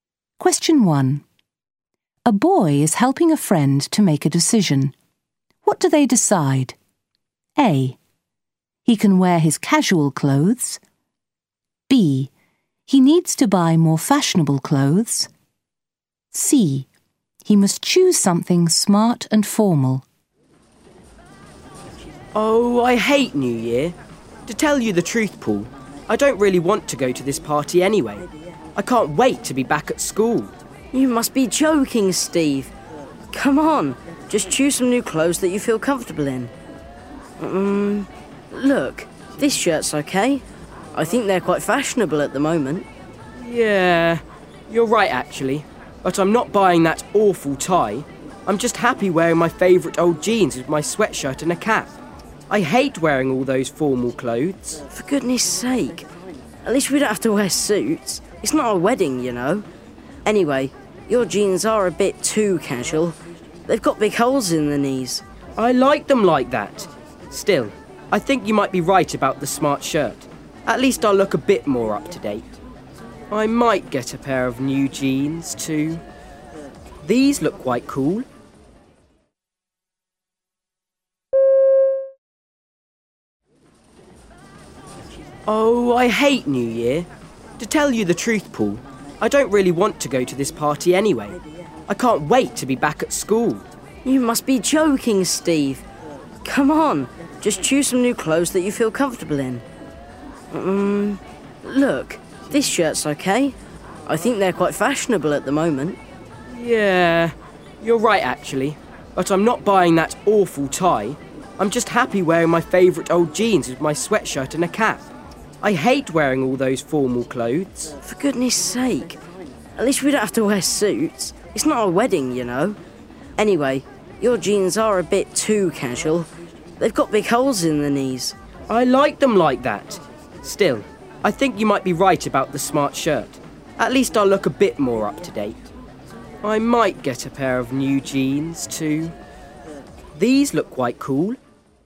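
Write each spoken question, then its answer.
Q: What do they decide?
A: B: He needs to buy more fashionable clothes.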